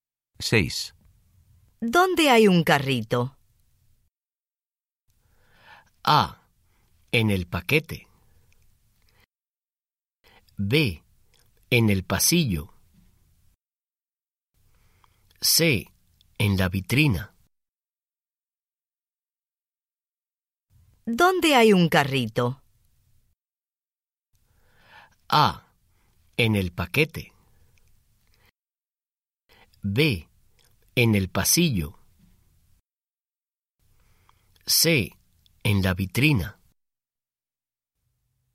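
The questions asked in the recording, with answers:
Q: ¿Dónde hay un carrito?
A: B: En el pasillo.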